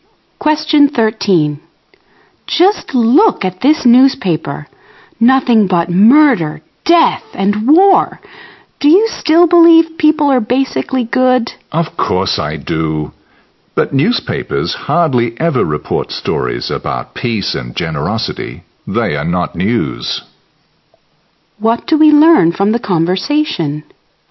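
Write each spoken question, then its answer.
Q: What do we learn from the conversation?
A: Newspapers seldom report good news about peace and generosity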